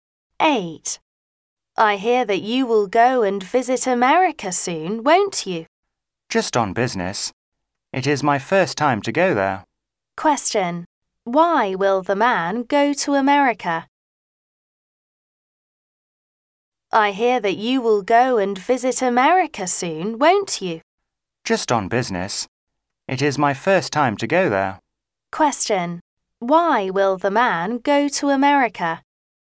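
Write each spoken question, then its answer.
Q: Why will the man go to America?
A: On business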